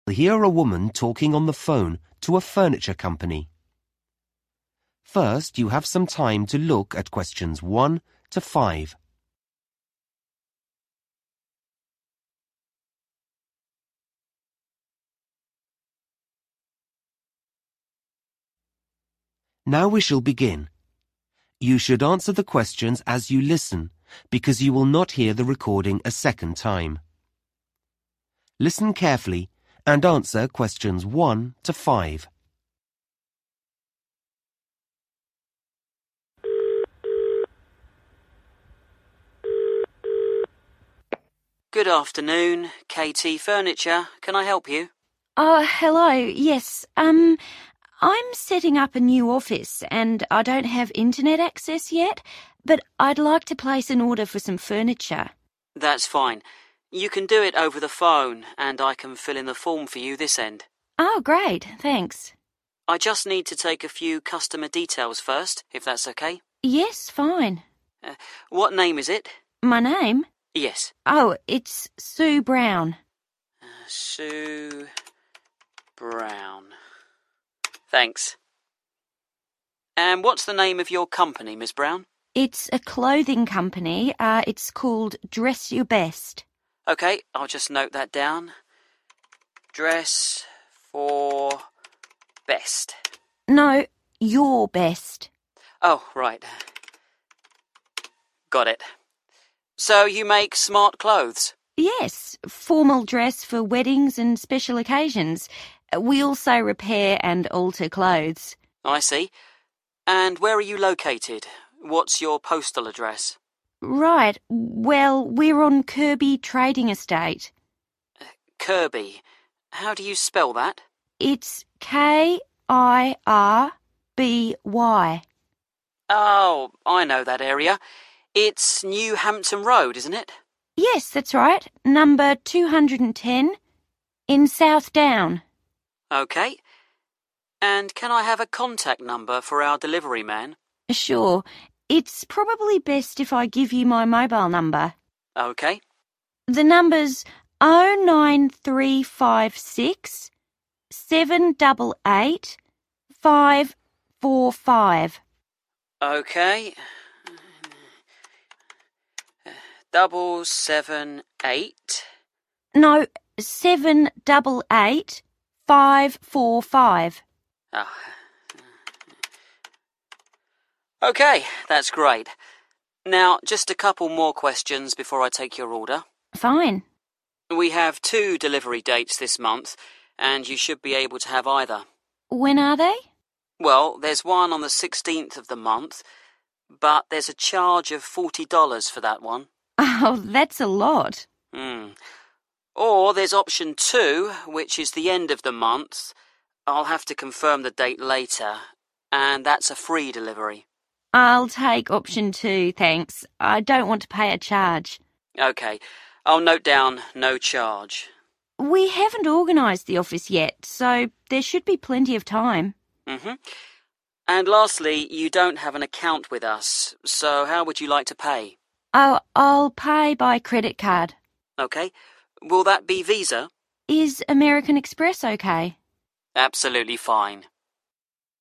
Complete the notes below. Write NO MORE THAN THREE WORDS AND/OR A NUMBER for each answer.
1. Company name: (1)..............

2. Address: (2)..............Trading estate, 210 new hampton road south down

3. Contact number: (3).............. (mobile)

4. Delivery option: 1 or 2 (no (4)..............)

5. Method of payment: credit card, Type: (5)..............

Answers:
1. dress your best
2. Kirby
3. 09356788545
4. (extra) charge
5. american express